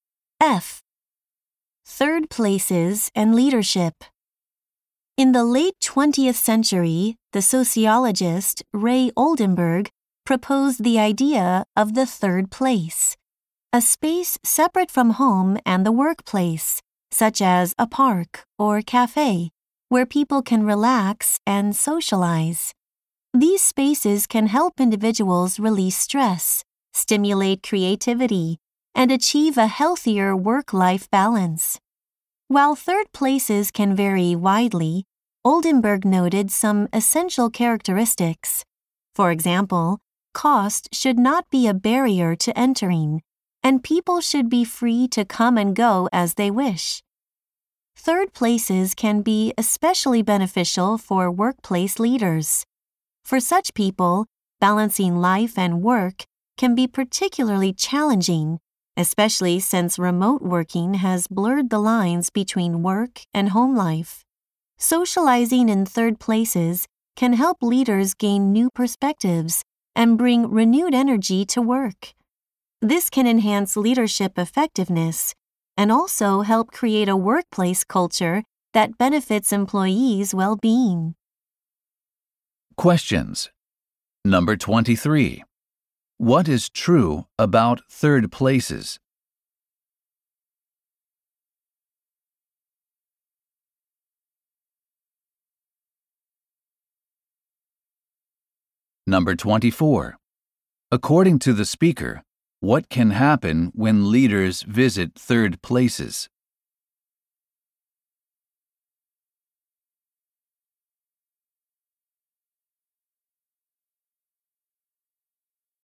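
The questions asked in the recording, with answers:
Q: According to the speaker, what can happen when leaders visit third places?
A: They gain new perspectives and renewed energy, improving leadership effectiveness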